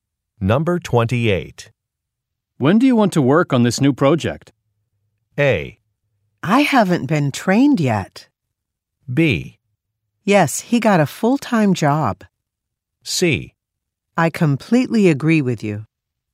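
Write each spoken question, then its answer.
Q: When do you want to work on this new project?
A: A: I haven't been trained yet.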